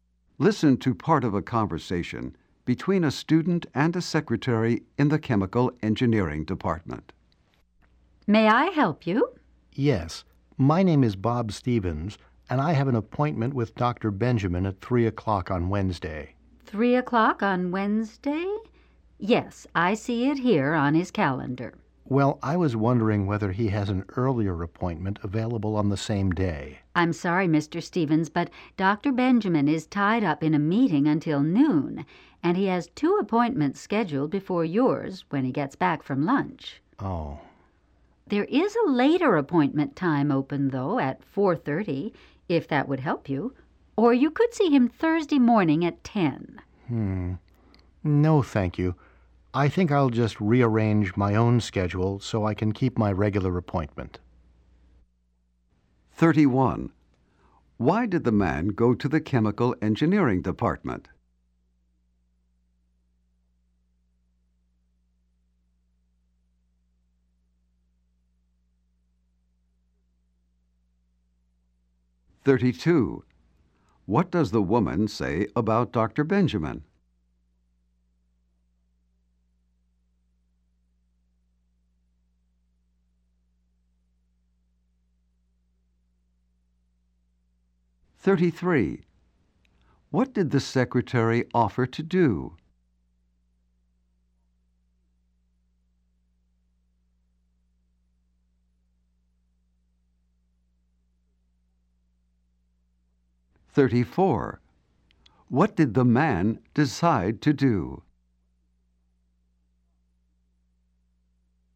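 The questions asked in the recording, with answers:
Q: Why did the man go to the chemical engineering department?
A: To try to get an earlier appointment with Dr. Benjamin

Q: What does the woman say about Dr.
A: He is in a meeting until noon and has two appointments after lunch.

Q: What did the secretary offer to do?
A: Give him a later appointment at 4:30 or Thursday at 10.

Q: What did the man decide to do?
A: Rearrange his schedule and keep his regular appointment.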